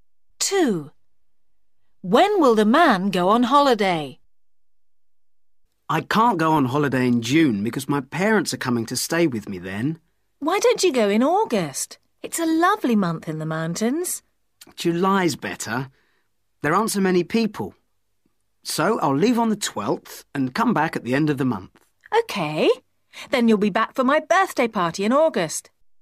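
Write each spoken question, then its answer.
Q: When will the man go on holiday?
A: In July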